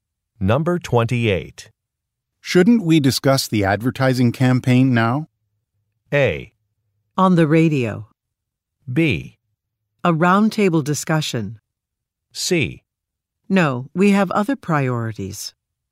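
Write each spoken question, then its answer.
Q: Shouldn't we discuss the advertising campaign now?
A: C: No, we have other priorities.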